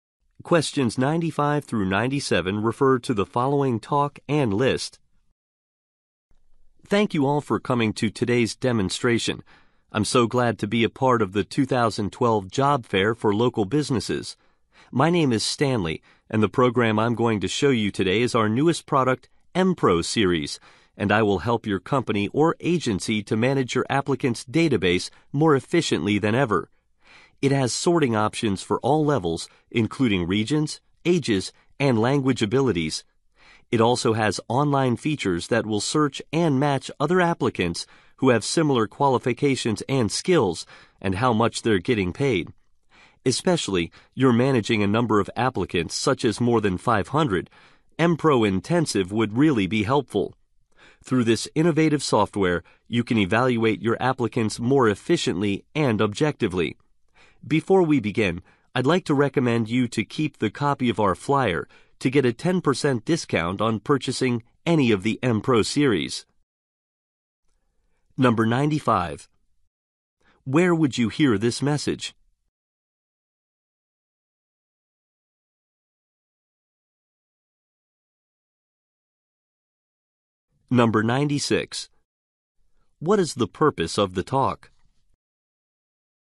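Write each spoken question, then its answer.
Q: Where would you hear this message?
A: At a job fair

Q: What is the purpose of the talk?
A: To demonstrate a new software product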